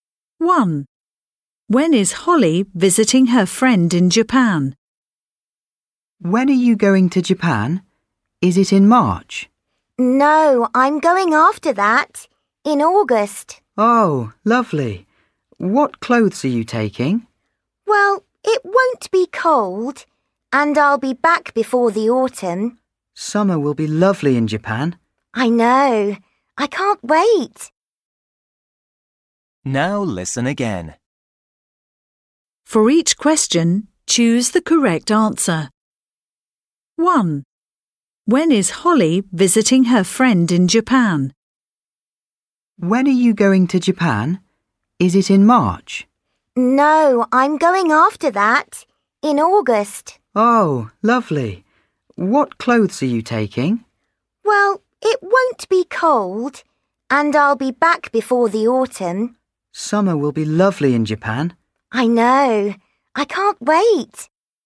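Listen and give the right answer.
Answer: In August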